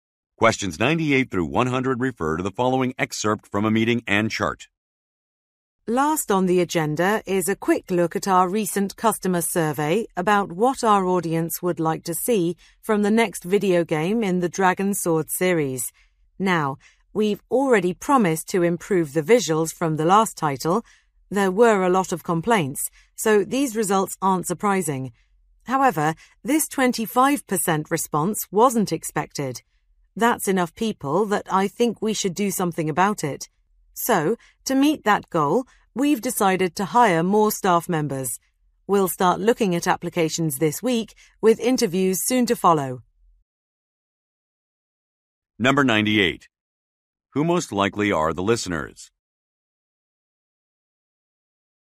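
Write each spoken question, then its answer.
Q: Who most likely are the listeners?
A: Video game developers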